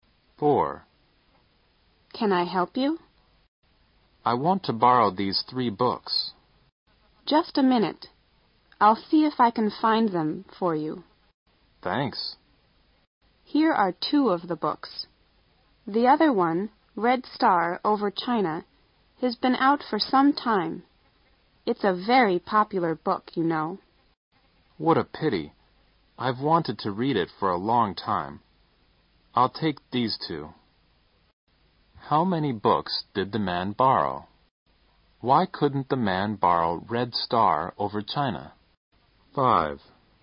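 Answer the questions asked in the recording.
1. Two
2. It had been out for some time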